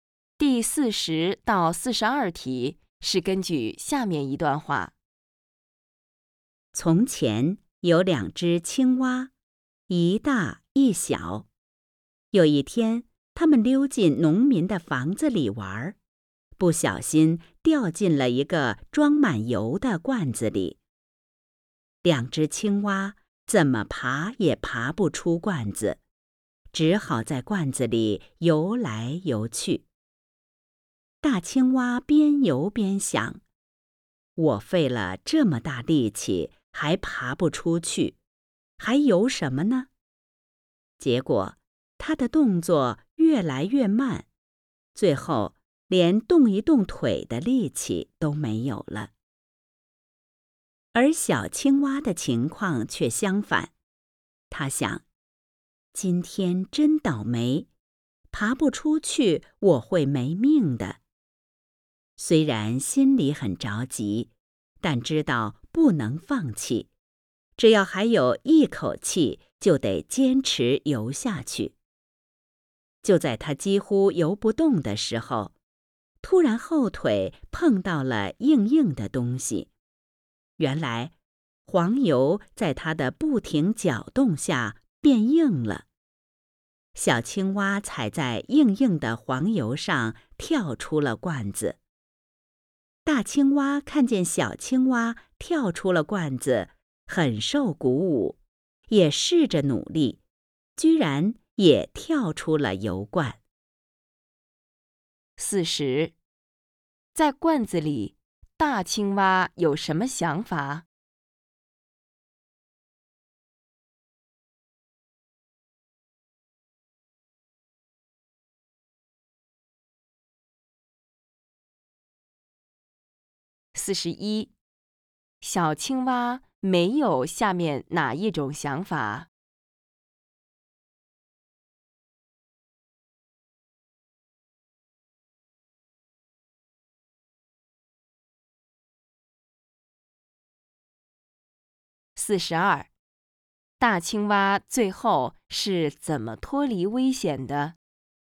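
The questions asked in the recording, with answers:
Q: 在罐子里,大青蛙有什么想法?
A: 费了很大力气也爬不出去,游也没用

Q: 大青蛙最后是怎么脱离危险的?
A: 受小青蛙鼓舞,努力跳出了油罐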